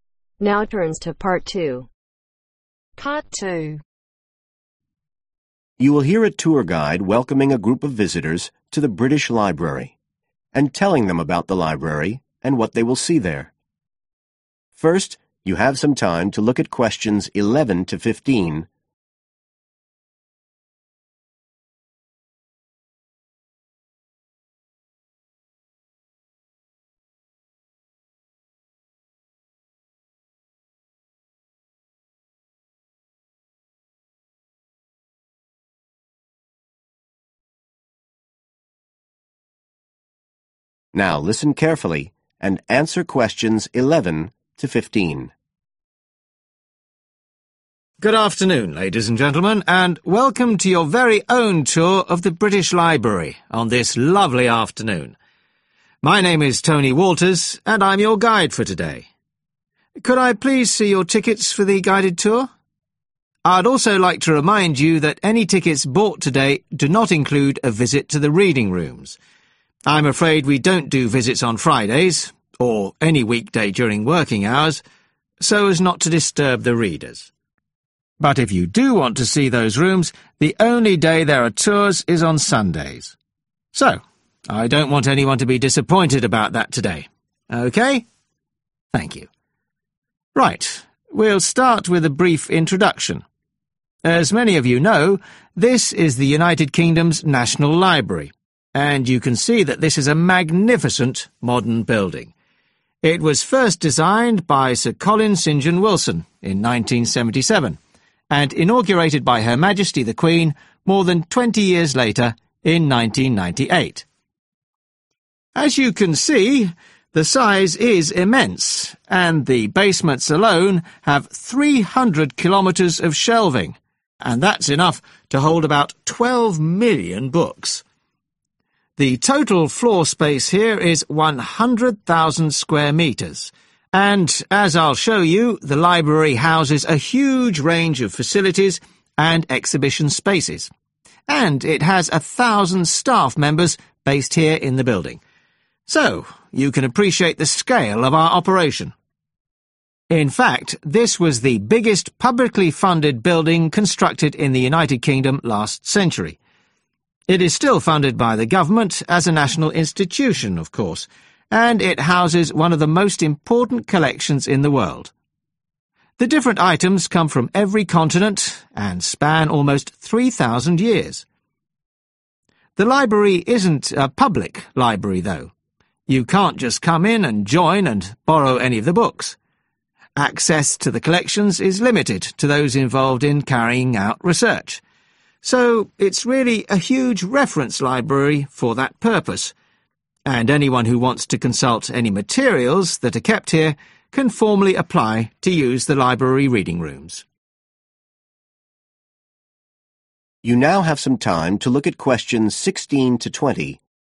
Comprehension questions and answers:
Complete the sentences below. Write ONE WORD OR A NUMBER for each answer.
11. The reading rooms are only for group visits on ............ .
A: Sundays

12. The library was officially opened in ............ .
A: 1998

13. All the library rooms together cover ............ m2.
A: 100,000

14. The library is financed by the ............ .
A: Government

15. The main function of the library is to provide resources for people ............ .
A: Research